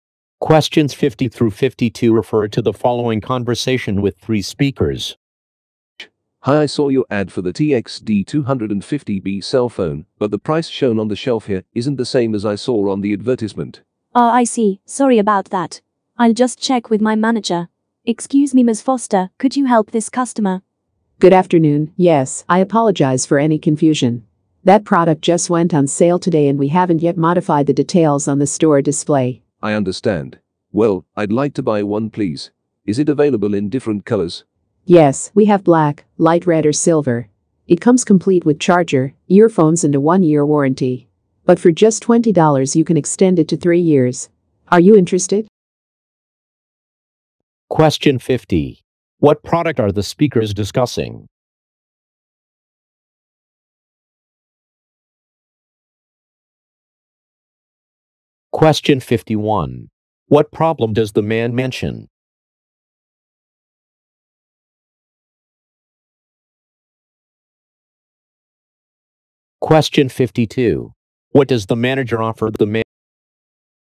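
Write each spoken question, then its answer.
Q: What product are the speakers discussing?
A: A cell phone

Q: What problem does the man mention?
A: The shelf price differs from the advertised price

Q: What does the manager offer the man?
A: An extended warranty for $20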